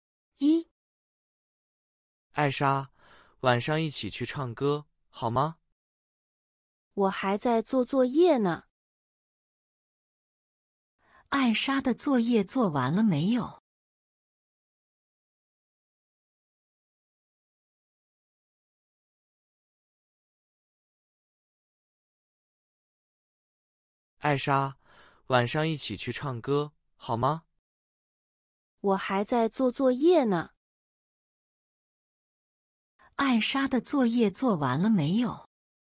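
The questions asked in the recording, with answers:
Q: 艾莎的作业做完了没有?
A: 没有,她还在做作业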